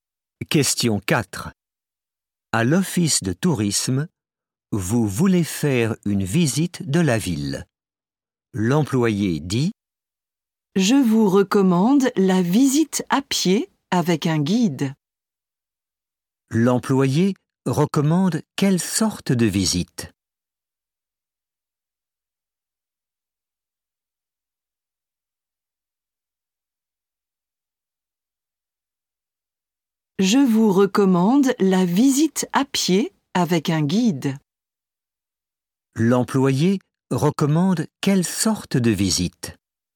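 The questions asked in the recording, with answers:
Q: L'employé recommande quelle sorte de visite?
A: La visite à pied avec un guide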